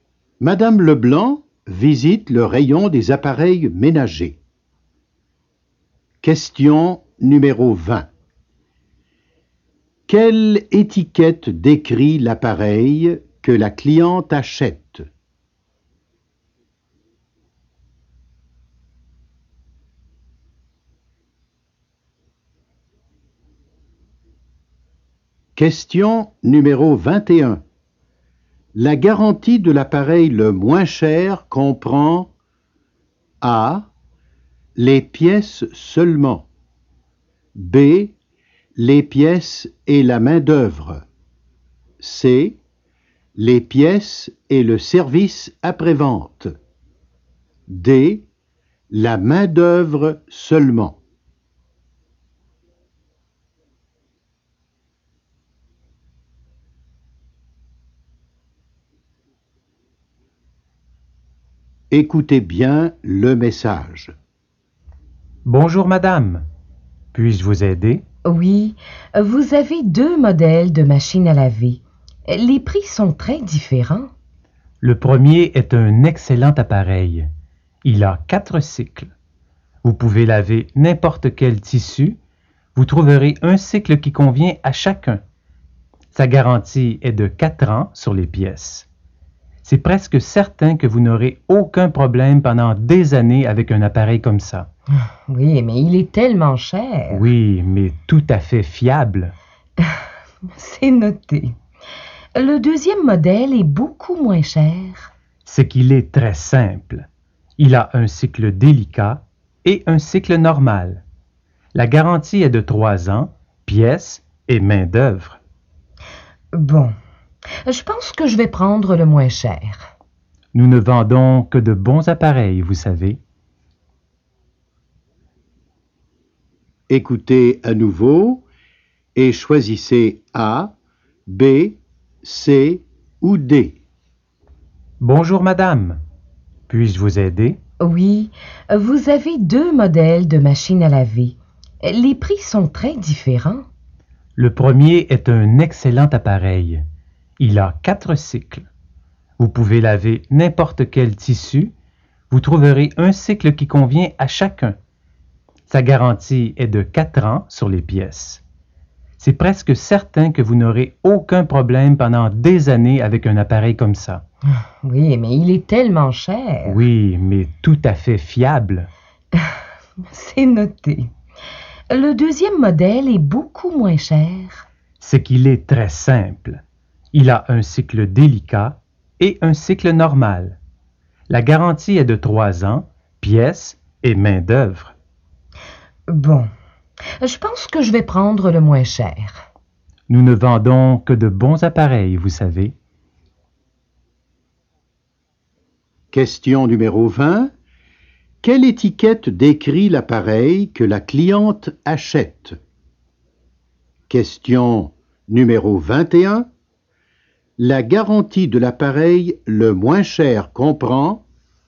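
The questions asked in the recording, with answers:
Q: La garantie de l'appareil le moins cher comprend A.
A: B: les pièces et la main-d'œuvre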